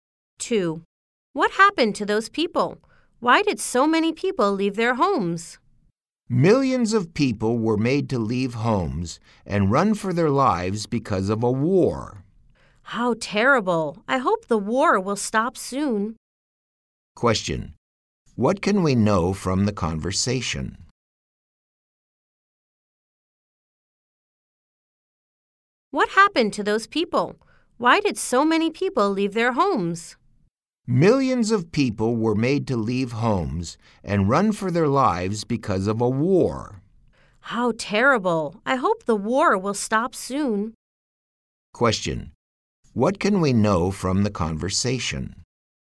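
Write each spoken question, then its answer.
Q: What can we know from the conversation?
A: Millions of people had to leave their homes because of a war.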